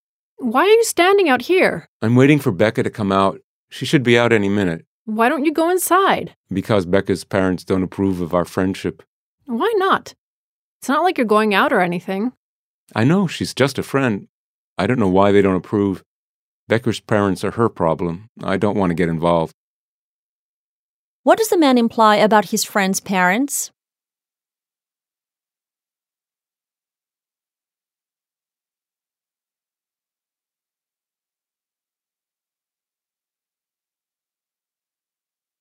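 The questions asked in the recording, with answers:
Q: What does the man imply about his friend's parents?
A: They don't approve of his friendship with Becca, and he doesn't want to get involved with them.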